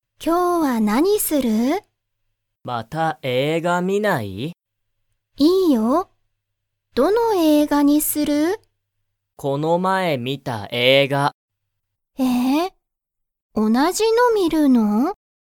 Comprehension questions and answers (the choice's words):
タケシは、____観みた映画えいがを観みたい。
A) この前まえ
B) 今度こんど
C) 少すこしだけ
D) あまり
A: この前まえ

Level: Level 1